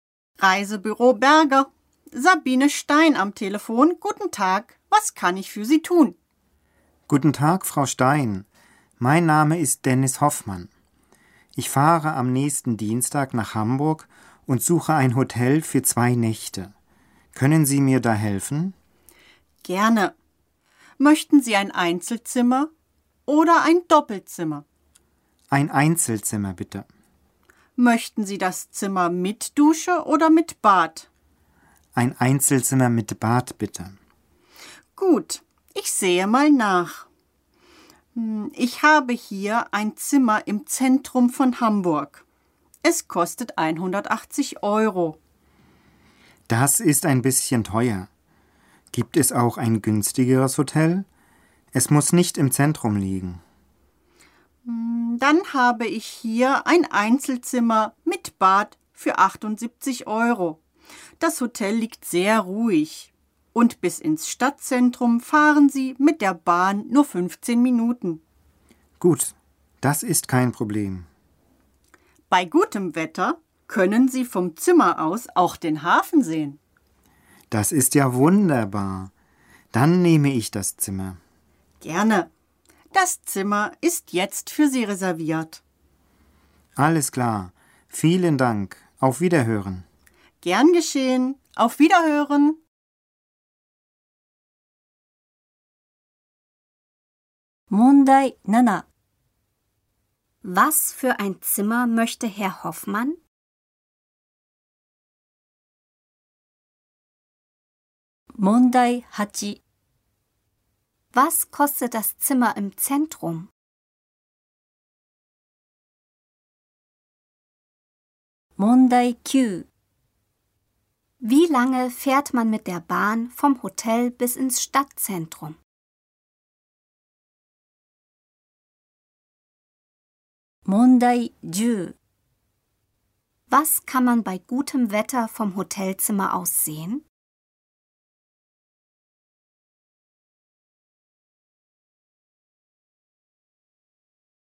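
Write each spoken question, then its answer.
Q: Was für ein Zimmer möchte Herr Hoffmann?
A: Ein Einzelzimmer mit Bad

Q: Was kostet das Zimmer im Zentrum?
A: 180 Euro

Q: Wie lange fährt man mit der Bahn vom Hotel bis ins Stadtzentrum?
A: 15 Minuten

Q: Was kann man bei gutem Wetter vom Hotelzimmer aus sehen?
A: Den Hafen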